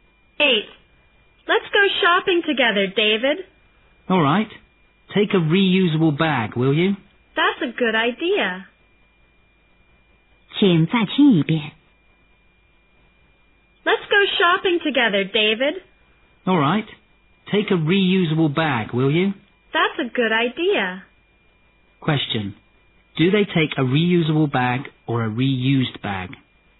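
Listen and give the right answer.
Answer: A reusable bag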